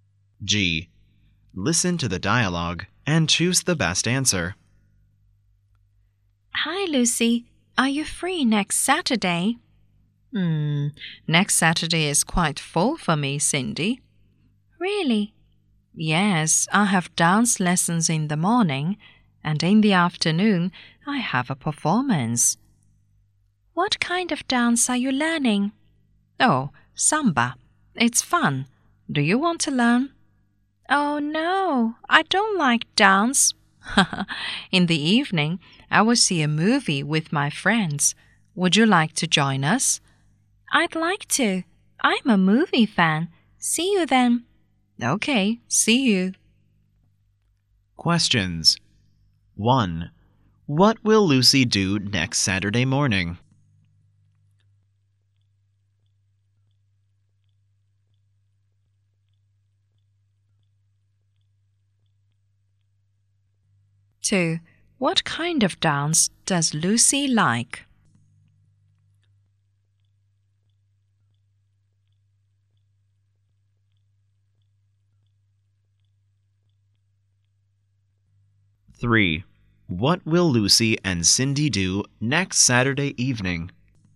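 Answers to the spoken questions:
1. Have dance lessons
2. Samba
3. See a movie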